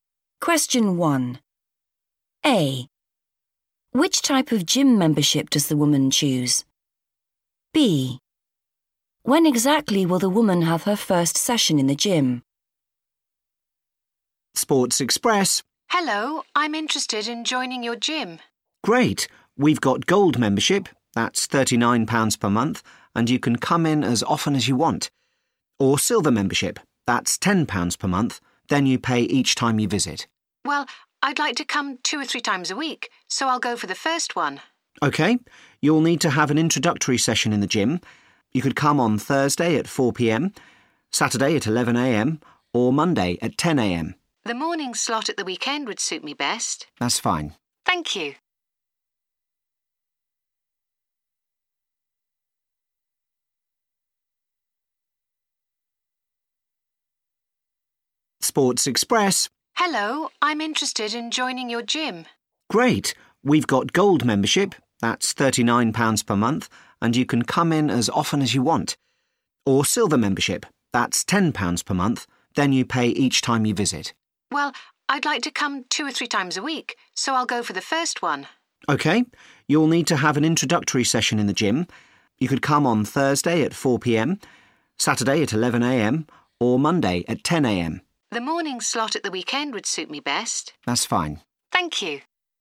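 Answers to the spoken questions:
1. gold membership
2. Saturday at 11am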